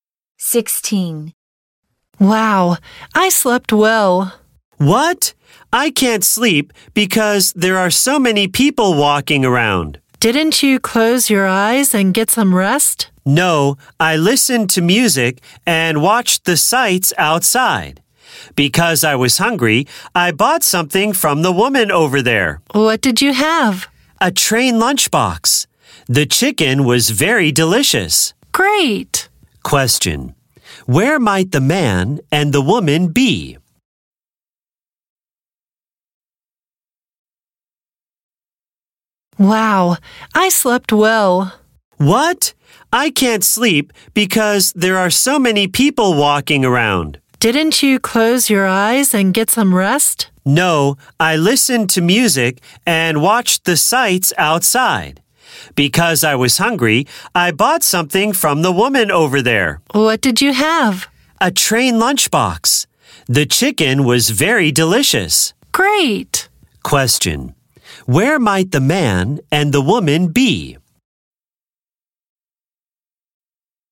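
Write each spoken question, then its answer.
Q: Where might the man and the woman be?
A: On a train.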